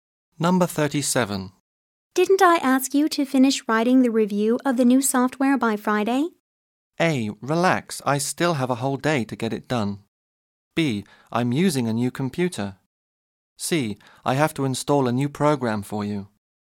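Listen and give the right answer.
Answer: A: Relax, I still have a whole day to get it done.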